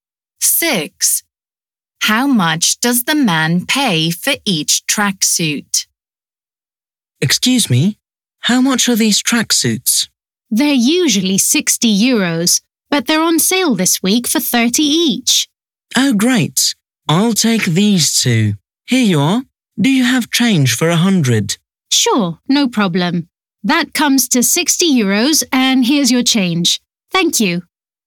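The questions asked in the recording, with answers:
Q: How much does the man pay for each tracksuit?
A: 30 euros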